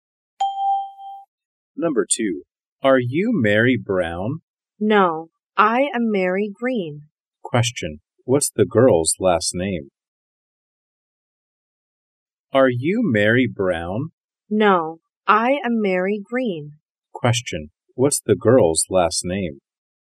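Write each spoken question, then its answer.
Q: what's the girl's last name?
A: Green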